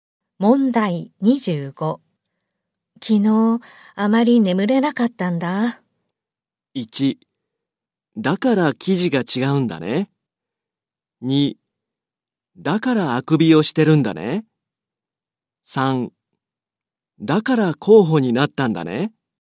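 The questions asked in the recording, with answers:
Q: 昨日、あまり眠れなかったんだ。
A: 2: だからあくびをしてるんだね。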